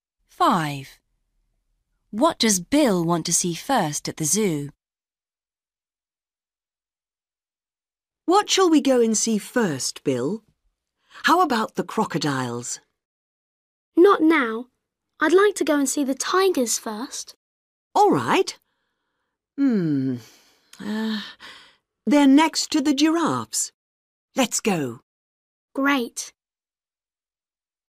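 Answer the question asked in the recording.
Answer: The tigers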